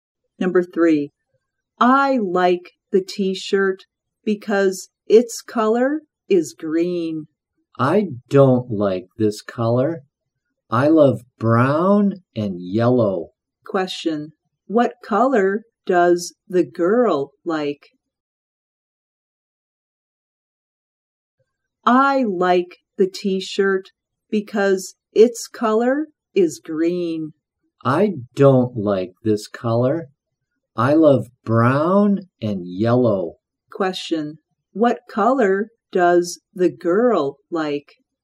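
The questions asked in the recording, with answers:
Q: what color does the girl like?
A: brown and yellow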